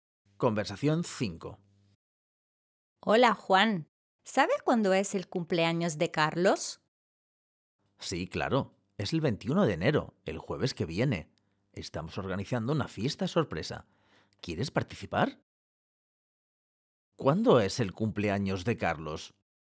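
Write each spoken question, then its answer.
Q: ¿Cuándo es el cumpleaños de Carlos?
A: el 21 de enero, el jueves que viene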